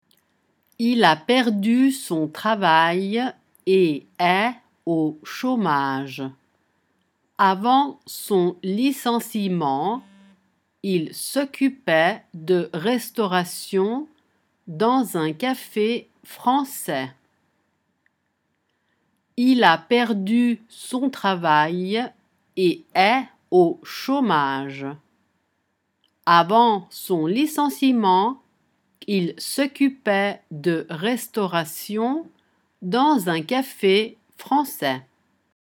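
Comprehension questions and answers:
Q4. Il au chômage. Avant , dans un café français.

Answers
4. a perdu son travail et est / son licenciement / il s'occupait de restauration

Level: A2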